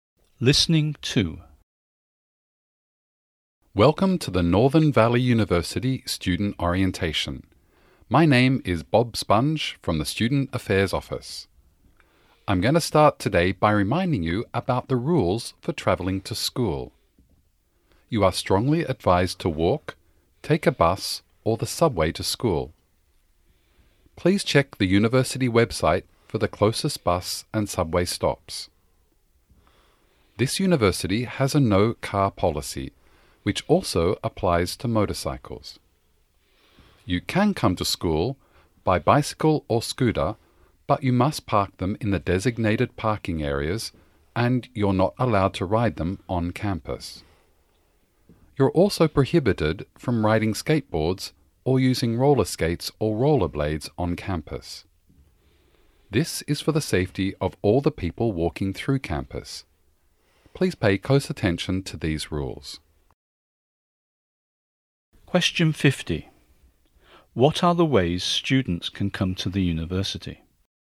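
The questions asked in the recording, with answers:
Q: What are the ways students can come to the university?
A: Walk, bus, subway, bicycle or scooter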